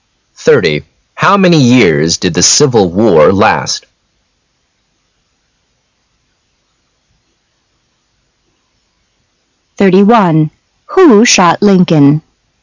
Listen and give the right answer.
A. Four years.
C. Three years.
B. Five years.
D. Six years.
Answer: A. Four years.